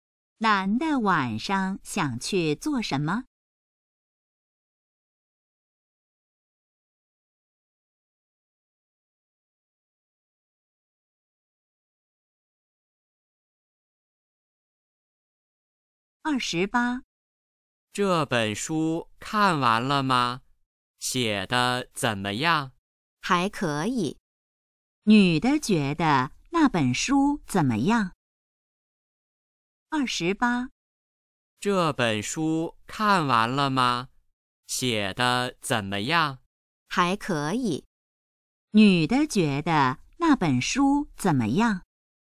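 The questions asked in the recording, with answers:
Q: 女的觉得那本书怎么样?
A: 还可以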